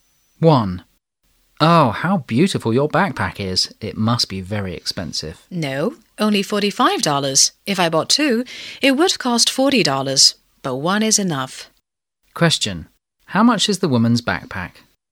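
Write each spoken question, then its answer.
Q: How much is the woman's backpack?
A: $45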